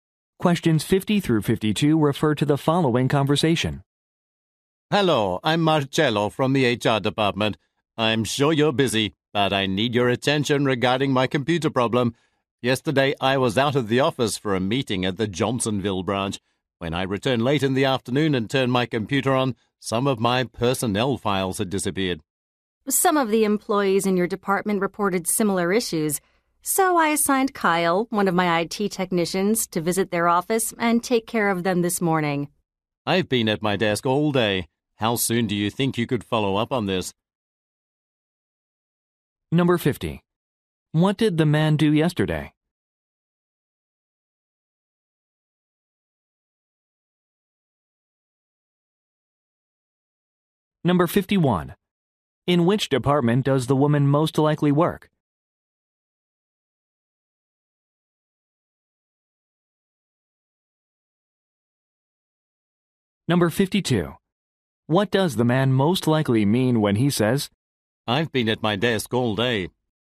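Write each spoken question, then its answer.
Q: What did the man do yesterday?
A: Went to a meeting at the Johnsonville branch

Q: In which department does the woman most likely work?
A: IT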